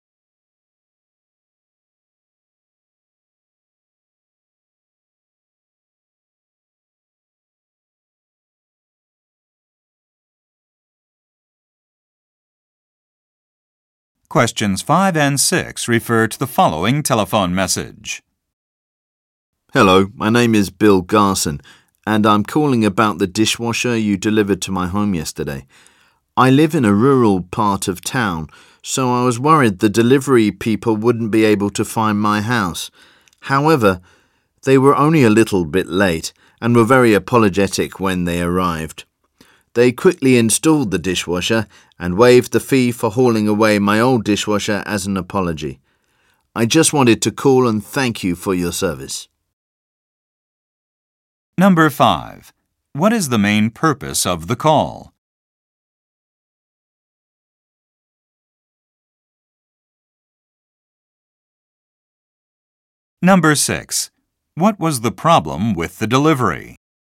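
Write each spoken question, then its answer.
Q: What is the main purpose of the call?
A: To thank the company for its service

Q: What was the problem with the delivery?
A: The delivery people were a little late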